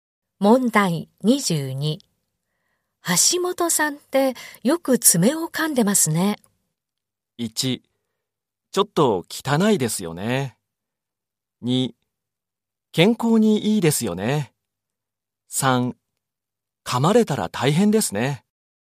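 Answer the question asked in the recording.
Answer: 1: ちょっと汚いですよね。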